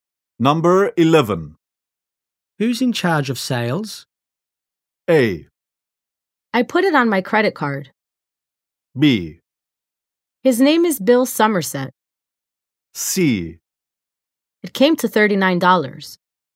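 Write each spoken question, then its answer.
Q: Who's in charge of sales?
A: B: His name is Bill Somerset.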